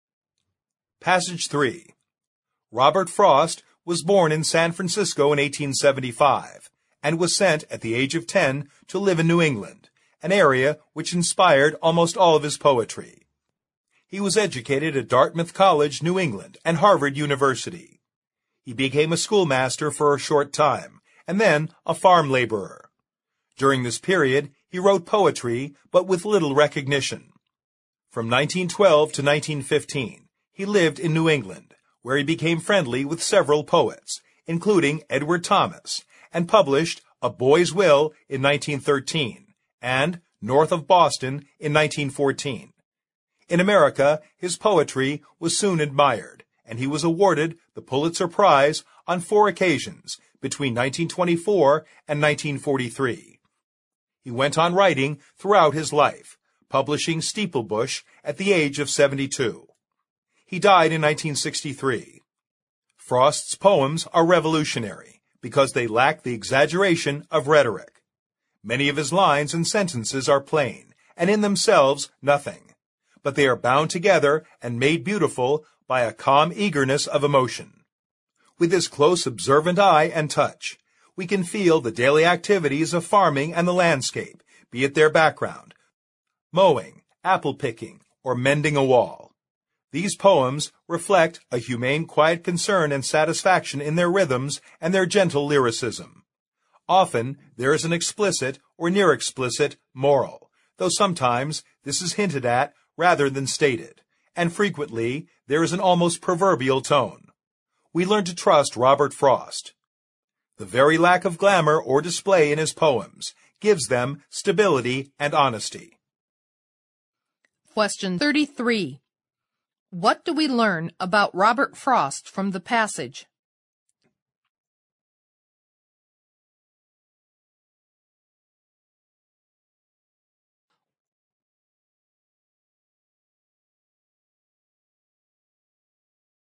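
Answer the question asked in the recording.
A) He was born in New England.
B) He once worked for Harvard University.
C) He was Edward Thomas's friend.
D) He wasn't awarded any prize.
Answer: C) He was Edward Thomas's friend.

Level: 六级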